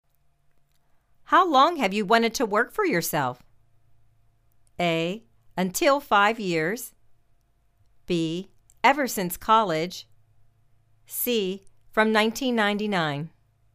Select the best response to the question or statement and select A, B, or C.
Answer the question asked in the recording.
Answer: Ever since college